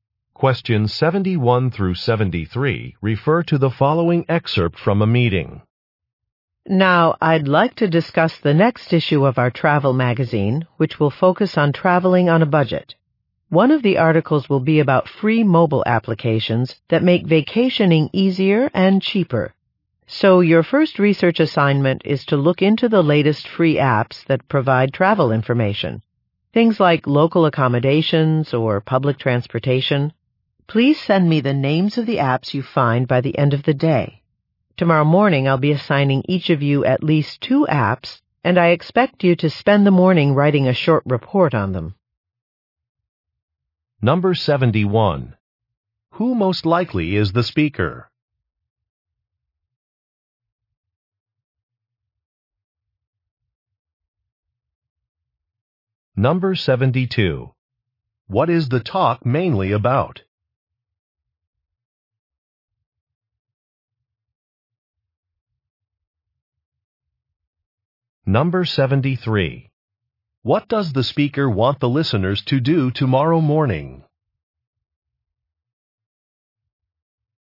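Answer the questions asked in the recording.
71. A magazine editor
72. Free travel apps for a magazine article on budget travel
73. Write short reports on assigned apps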